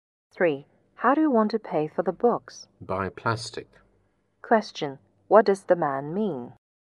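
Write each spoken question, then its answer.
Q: What does the man mean?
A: He will pay by credit card.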